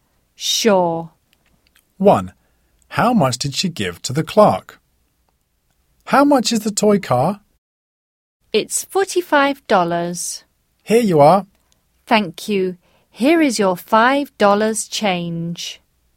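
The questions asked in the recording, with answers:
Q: How much did she give to the clerk?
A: $50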